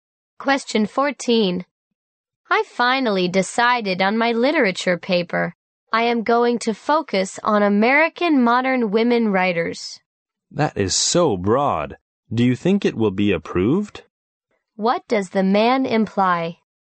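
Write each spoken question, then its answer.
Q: What does the man imply?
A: The topic is too broad and may not be approved.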